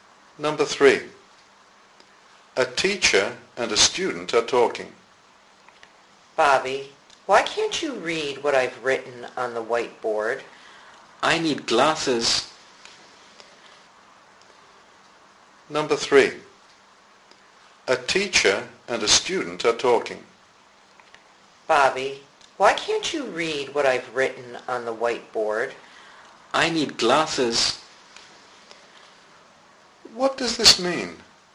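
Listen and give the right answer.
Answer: Bobby can't see well and needs glasses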